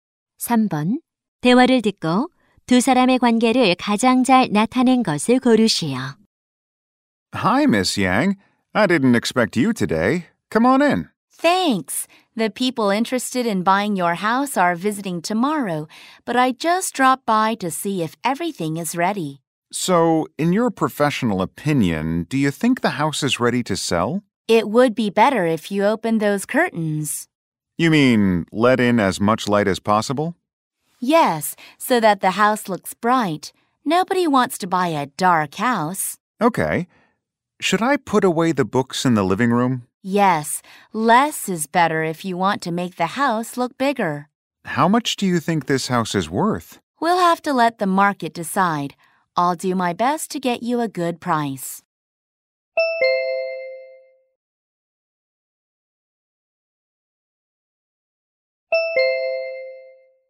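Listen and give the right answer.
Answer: 집주인 - 부동산 중개인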